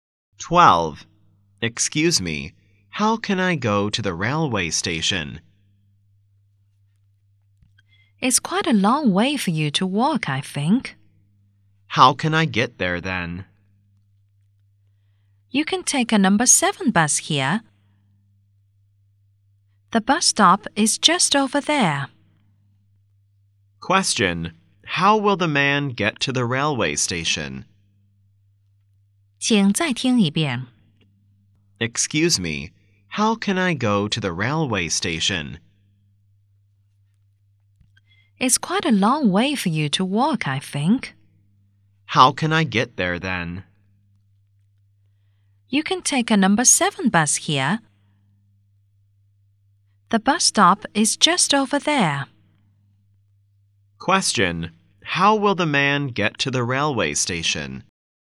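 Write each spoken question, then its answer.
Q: Question. How will the man get to the railway station?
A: By number 7 bus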